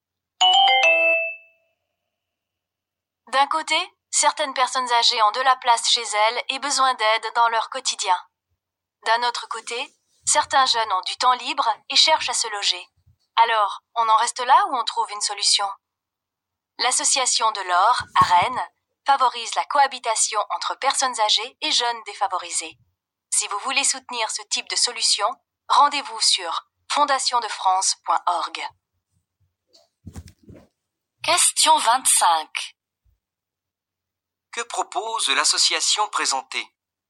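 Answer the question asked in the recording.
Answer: La cohabitation entre personnes âgées et jeunes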